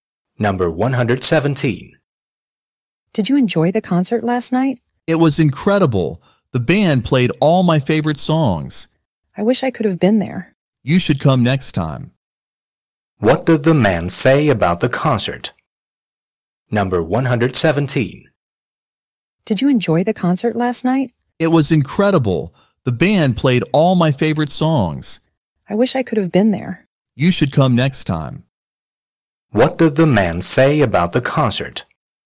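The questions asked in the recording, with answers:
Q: What did the man say about the concert?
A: It was incredible; the band played all his favorite songs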